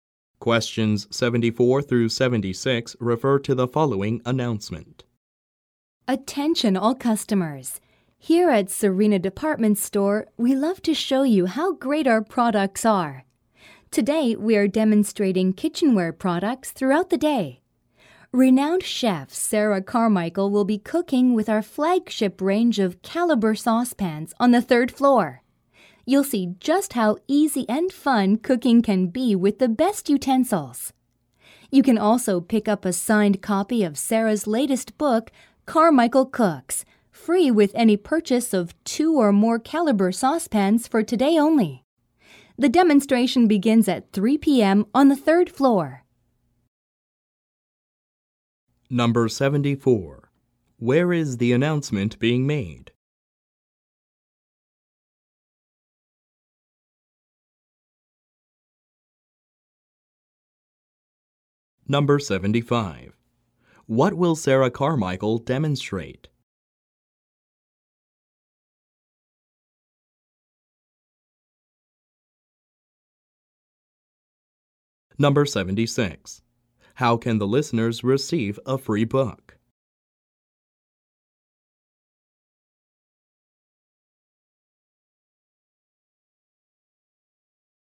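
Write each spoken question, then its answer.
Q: Where is the announcement being made?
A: At a department store

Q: What will Sarah Carmichael demonstrate?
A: Cooking with caliber saucepans

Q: How can the listeners receive a free book?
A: By buying two or more caliber saucepans today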